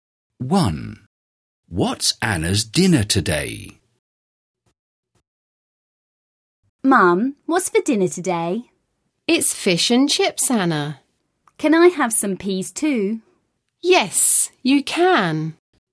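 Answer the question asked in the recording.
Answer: Fish and chips with peas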